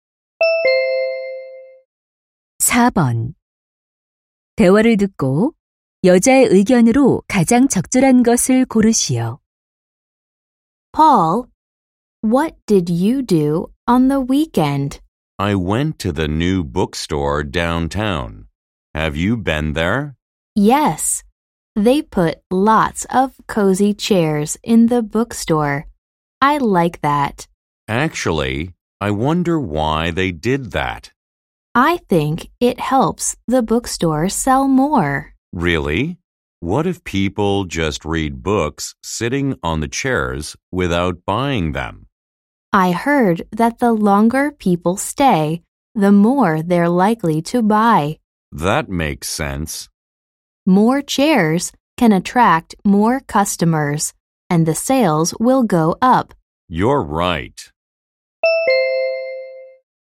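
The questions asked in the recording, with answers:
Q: 대화를 듣고 여자의 의견으로 가장 적절한 것을 고르시오.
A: 서점의 의자는 매출 증가에 도움이 된다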